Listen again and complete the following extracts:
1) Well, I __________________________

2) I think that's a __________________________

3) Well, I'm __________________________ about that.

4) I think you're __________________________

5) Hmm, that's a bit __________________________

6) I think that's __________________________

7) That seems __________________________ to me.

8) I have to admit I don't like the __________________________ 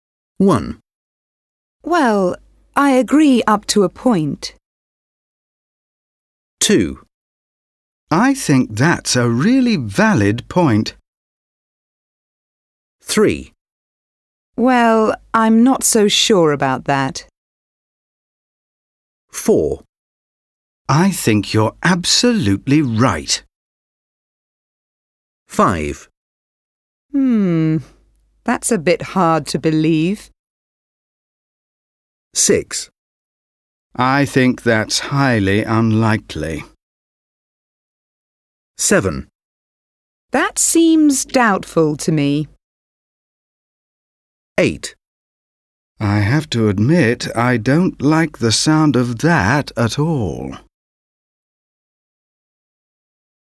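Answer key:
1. agree up to a point
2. really valid point
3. not so sure
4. absolutely right
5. hard to believe
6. highly unlikely
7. doubtful
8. sound of that at all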